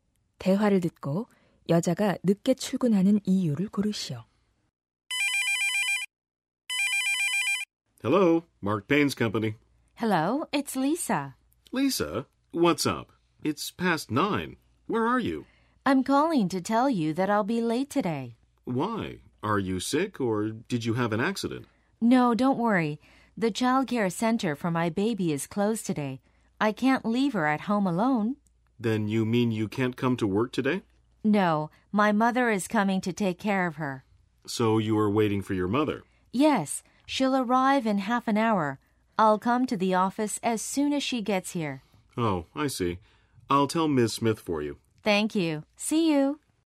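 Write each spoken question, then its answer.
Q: 대화를 듣고 여자가 늦게 출근하는 이유를 고르시오.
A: 아기 어린이집이 오늘 문을 닫아서 엄마를 기다려야 하기 때문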